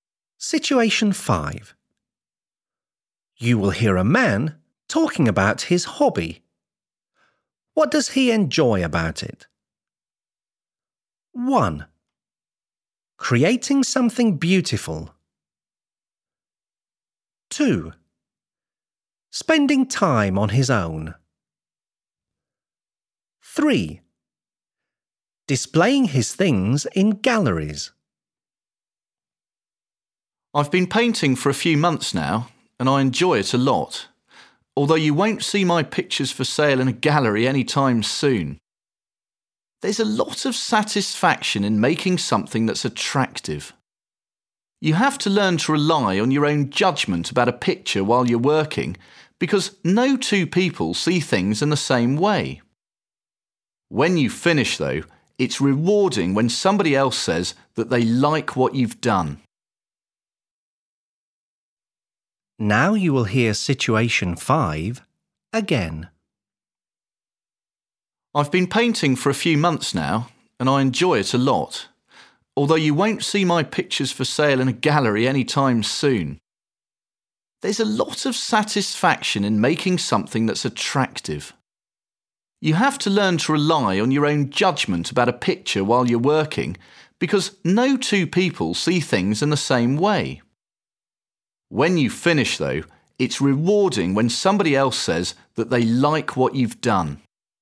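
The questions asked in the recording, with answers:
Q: What does he enjoy about it?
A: 1: Creating something beautiful.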